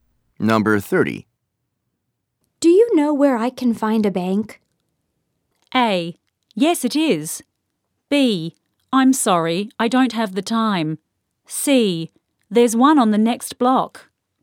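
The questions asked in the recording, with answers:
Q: Do you know where I can find a bank?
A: C: There's one on the next block.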